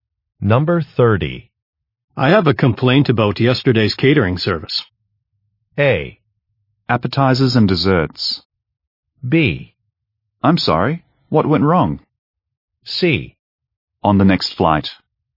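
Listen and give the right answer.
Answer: B: I'm sorry. What went wrong?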